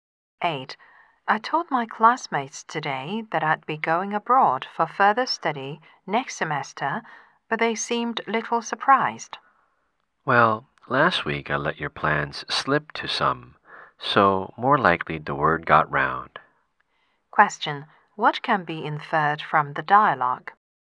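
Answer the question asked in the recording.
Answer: The man had told some people about her plans, so the news spread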